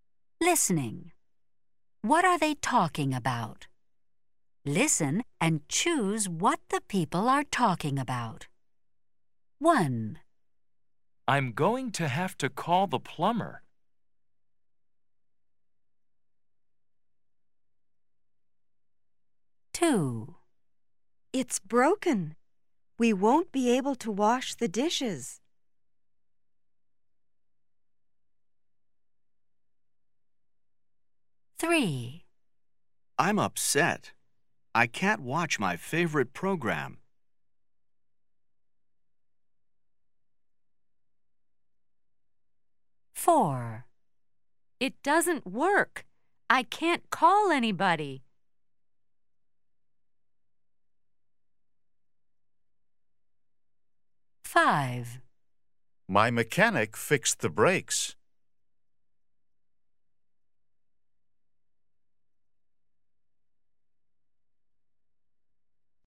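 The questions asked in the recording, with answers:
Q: What are they talking about?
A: the TV

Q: What are they talking about?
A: the phone

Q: What are they talking about?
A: the car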